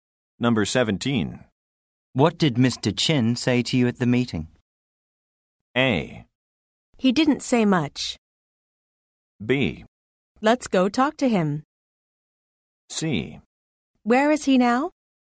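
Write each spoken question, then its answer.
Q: What did Mr. Chin say to you at the meeting?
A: A: He didn't say much.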